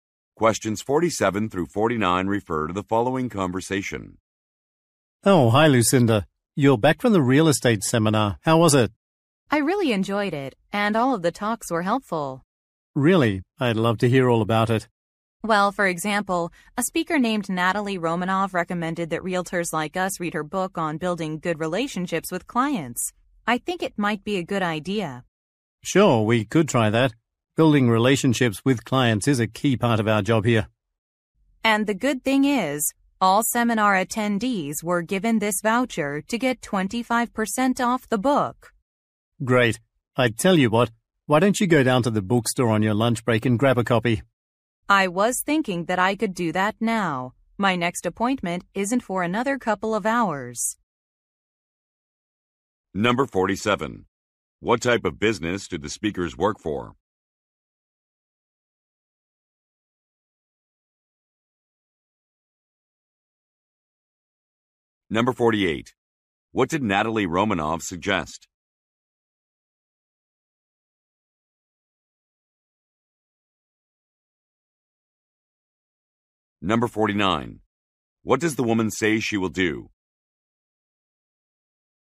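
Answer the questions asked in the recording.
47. A real estate agency
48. Reading her book on building client relationships
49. Go to the bookstore now to buy the book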